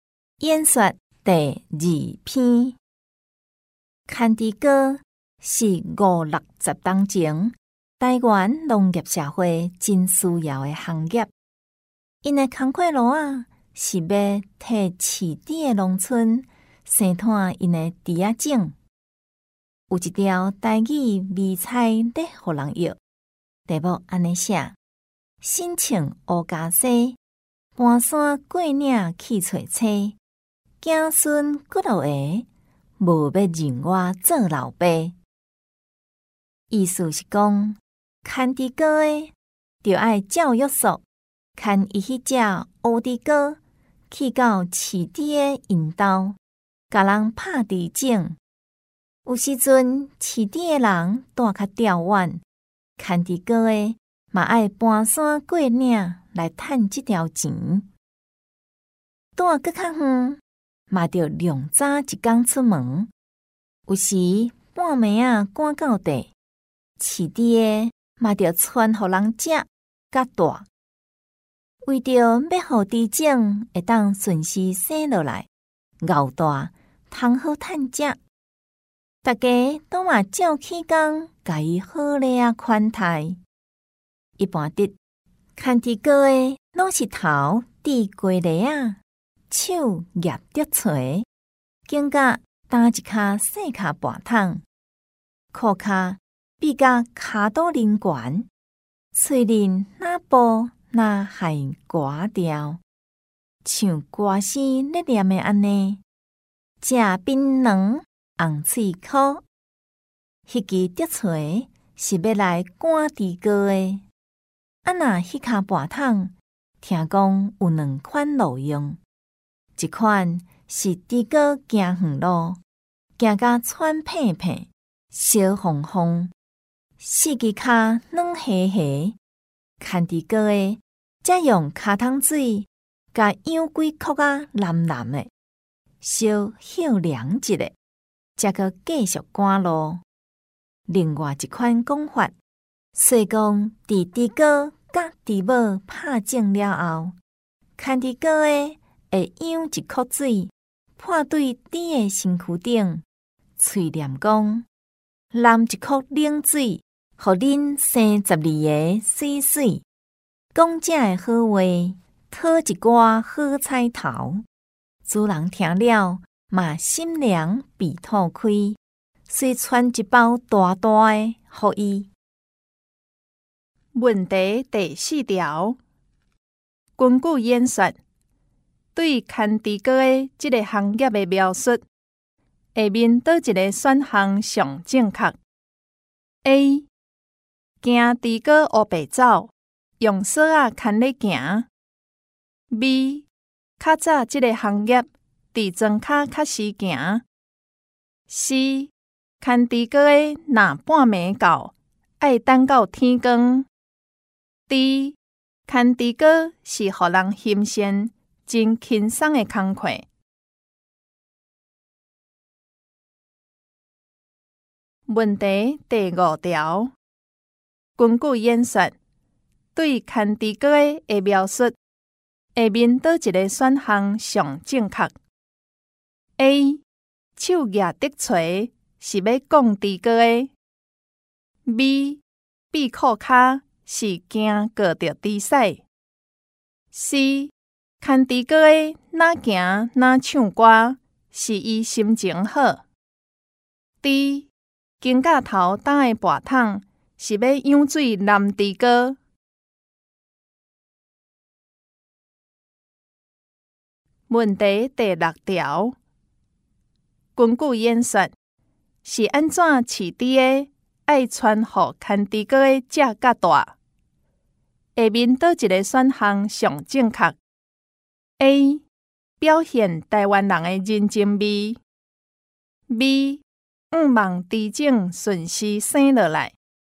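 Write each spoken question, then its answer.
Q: 根据演说,对牵猪哥的描述,下面倒一个选项最正确 ?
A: D: 金甲头搭的拔桶是要养水男猪哥

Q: 根据演说,是安怎饲猪的爱穿好牵猪哥的只较大?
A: B: 五望猪种顺势生下来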